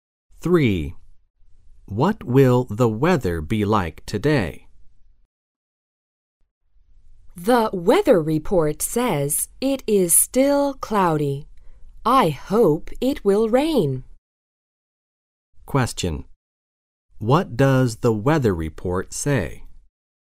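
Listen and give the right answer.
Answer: It is still cloudy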